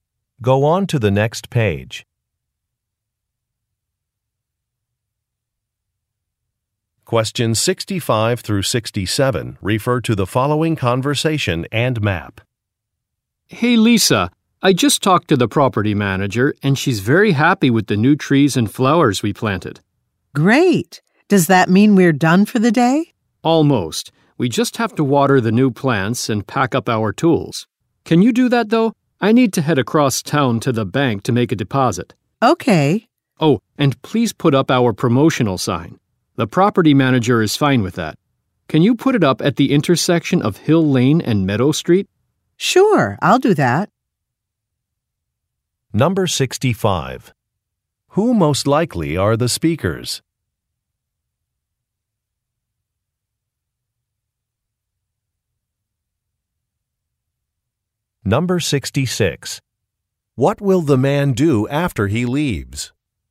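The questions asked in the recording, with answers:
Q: Who most likely are the speakers?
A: Landscapers (gardeners)

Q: What will the man do after he leaves?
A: Go to the bank to make a deposit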